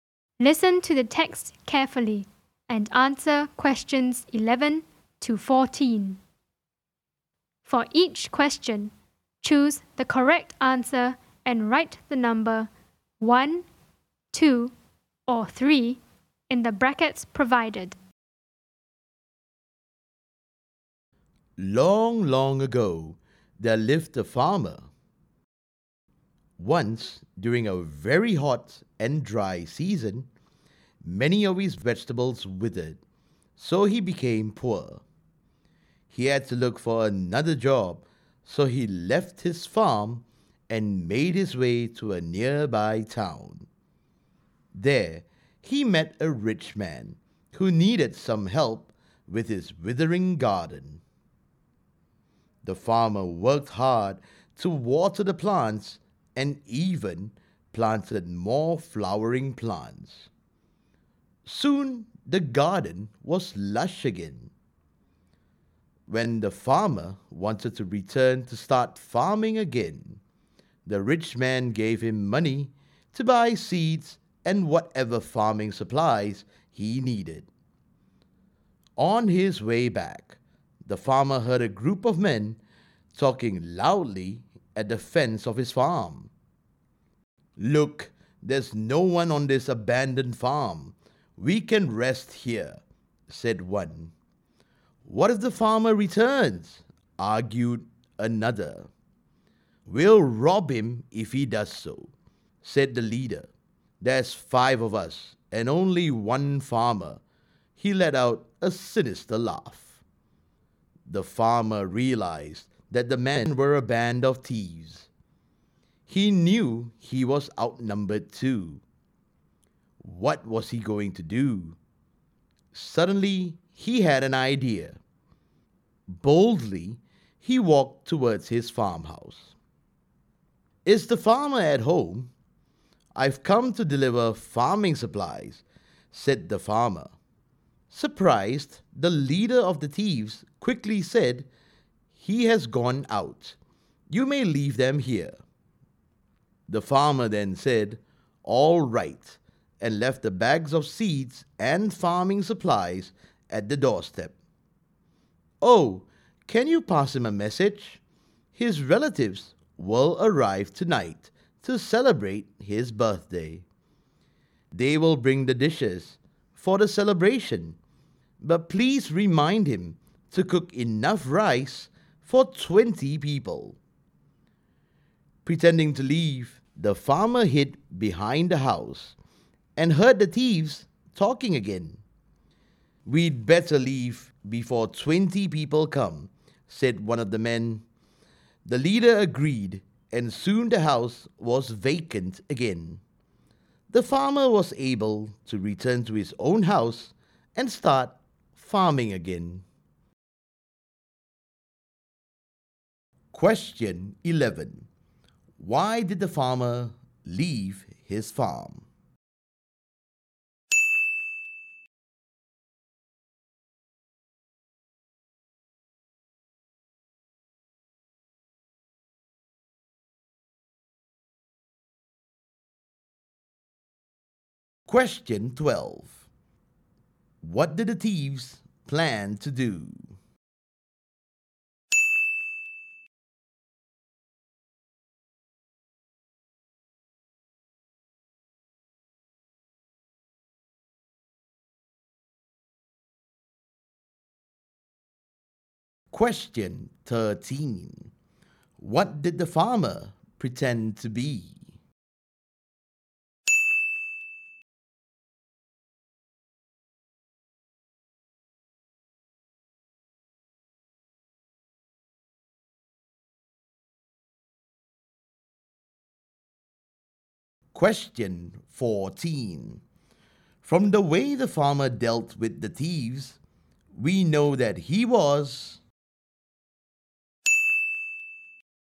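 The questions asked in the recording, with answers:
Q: Why did the farmer leave his farm?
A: His vegetables withered in the hot, dry season, so he became poor and had to look for another job.

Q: What did the thieves plan to do?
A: Rest at the farm and rob the farmer if he returned.

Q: What did the farmer pretend to be?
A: A man delivering farming supplies.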